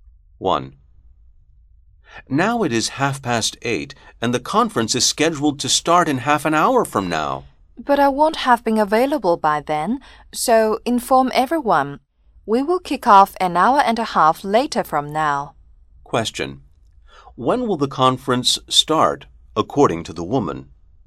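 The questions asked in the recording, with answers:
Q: When will the conference start, according to the woman?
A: At 10:00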